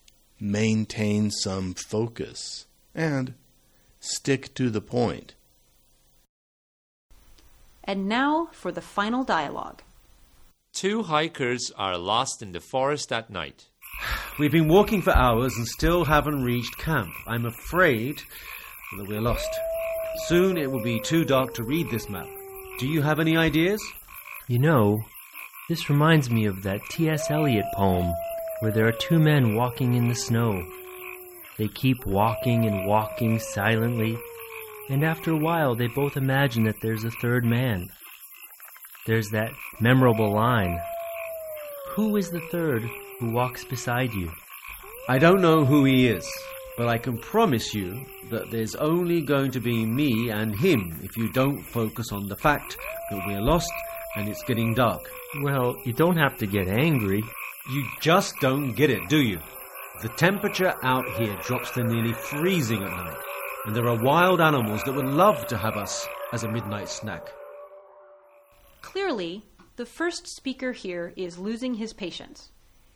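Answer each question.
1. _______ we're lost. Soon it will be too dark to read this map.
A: I'm afraid that

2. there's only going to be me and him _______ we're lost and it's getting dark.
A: if you don't focus on the fact that

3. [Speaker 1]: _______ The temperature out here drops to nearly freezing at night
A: You just don't get it, do you?

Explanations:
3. Then to add to that, he says, "You just don't get it, do you?" This should focus the other person's attention on the fact that he is missing some important information.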